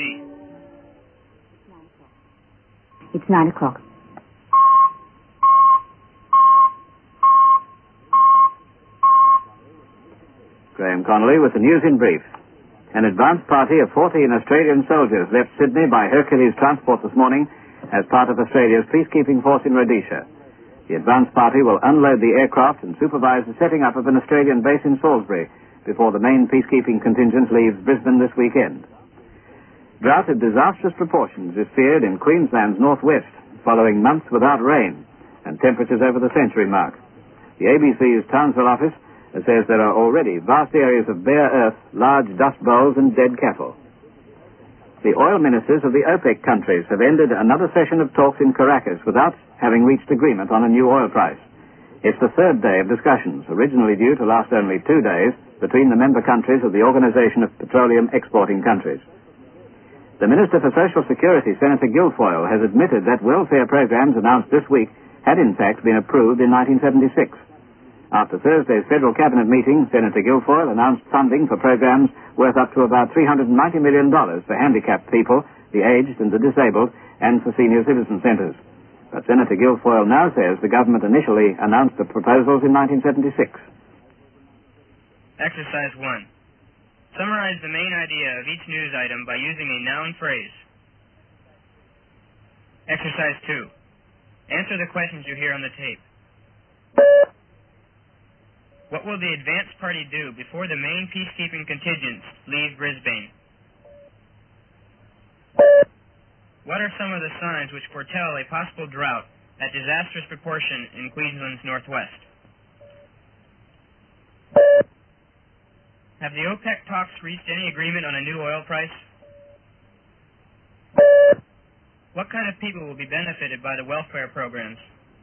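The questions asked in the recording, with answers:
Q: What will the advance party do before the main peacekeeping contingents leave Brisbane?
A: Unload the aircraft and supervise the setting up of an Australian base in Salisbury

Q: What are some of the signs which foretell a possible drought at disastrous proportion in Queensland's northwest?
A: Months without rain, temperatures over the century mark, vast areas of bare earth, large dust bowls and dead cattle

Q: Have the OPEC talks reached any agreement on a new oil price?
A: No

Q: What kind of people will be benefited by the welfare programs?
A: Handicapped people, the aged and the disabled, and senior citizens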